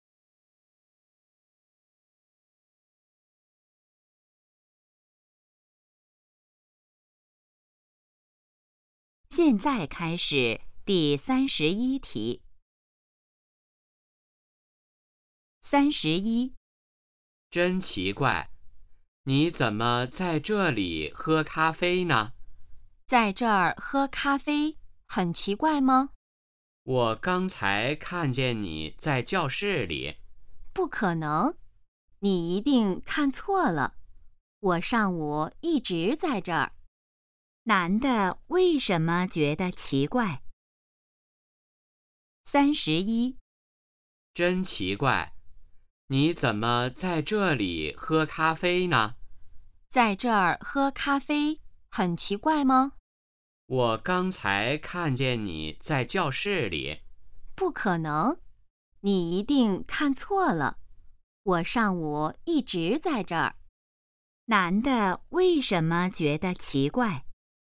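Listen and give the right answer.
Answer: 他刚才好像看见女的在教室里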